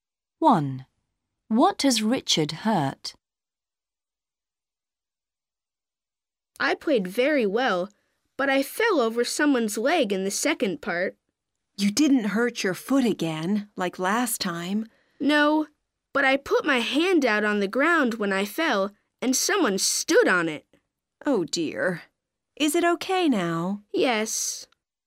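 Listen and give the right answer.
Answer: his hand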